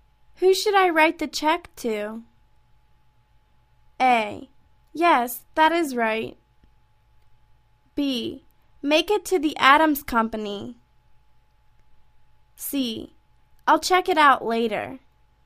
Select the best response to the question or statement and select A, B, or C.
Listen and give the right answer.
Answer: Make it to the Adams Company.